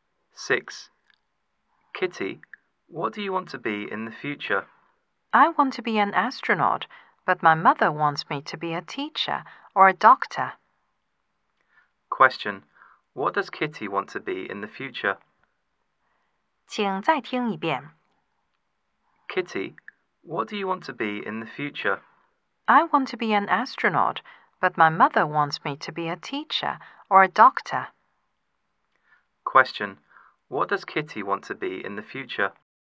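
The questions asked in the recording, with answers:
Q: What does Kitty want to be in the future?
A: An astronaut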